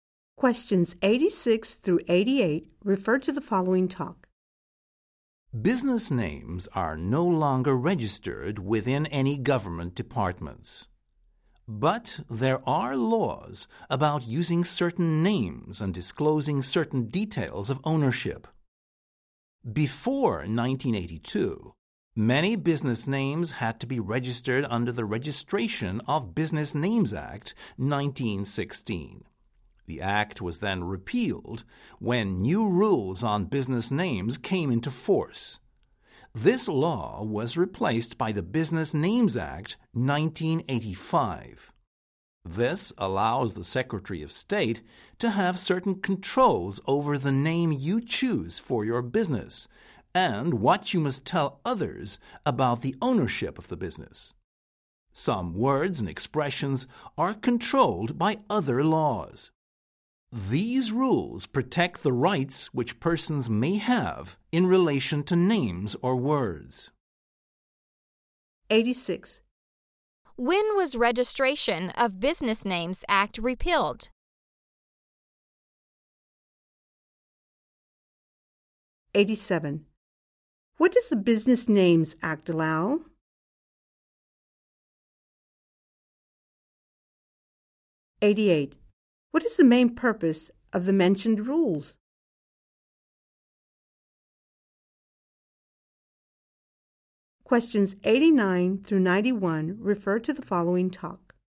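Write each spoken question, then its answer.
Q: What does the Business Names Act allow?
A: The Secretary of State to have some control over business names and ownership disclosure

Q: What is the main purpose of the mentioned rules?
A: To protect people's rights in names or words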